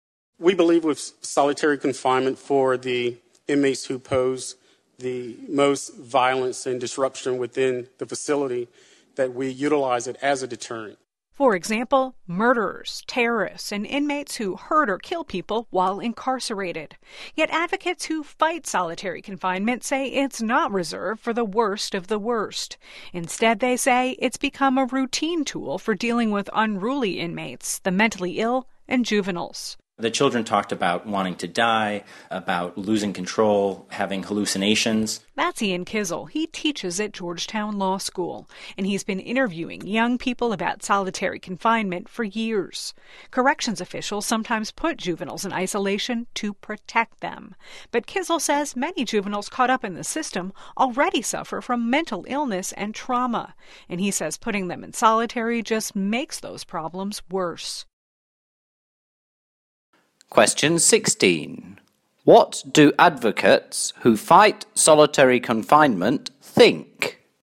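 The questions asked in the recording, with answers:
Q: What do advocates who fight solitary confinement think?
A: It has become routine for unruly inmates, the mentally ill and juveniles, not only the worst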